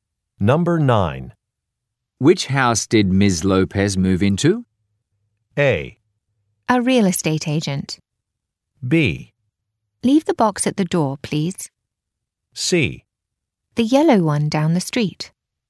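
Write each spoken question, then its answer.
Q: Which house did Ms. Lopez move into?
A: C: The yellow one down the street.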